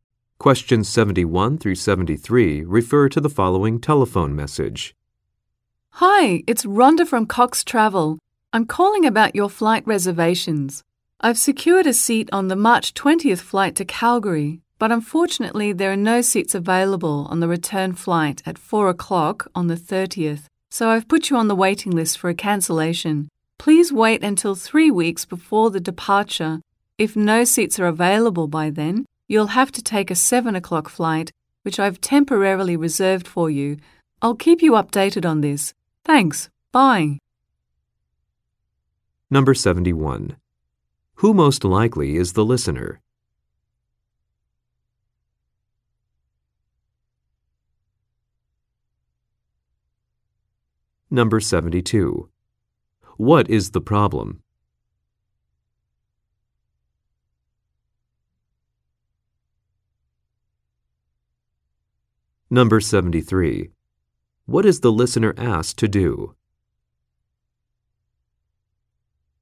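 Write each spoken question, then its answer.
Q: Who most likely is the listener?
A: A traveler who booked flights to Calgary

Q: What is the problem?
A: No seats are available on the return flight

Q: What is the listener asked to do?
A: Wait until 3 weeks before departure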